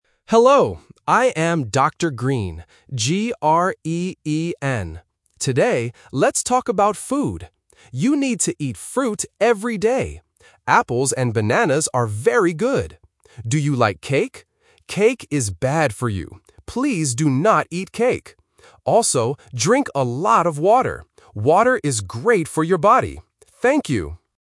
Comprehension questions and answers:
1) How does the doctor spell his name?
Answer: G-R-E-E-N

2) What food is BAD for you?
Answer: Cake

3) What does the doctor want you to drink?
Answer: Water

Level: A1